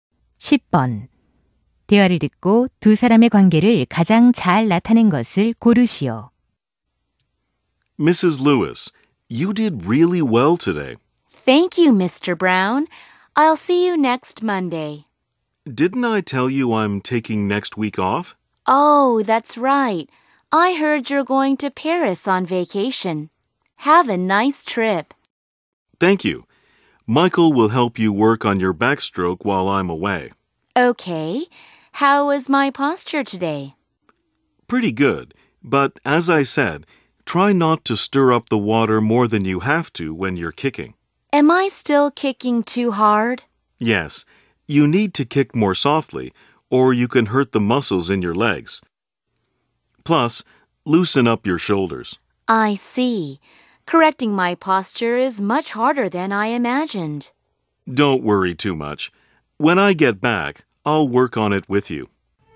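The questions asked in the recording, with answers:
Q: 대화를 듣고 두 사람의 관계를 가장 잘 나타낸 것을 고르시오.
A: 수영 강사 - 수강생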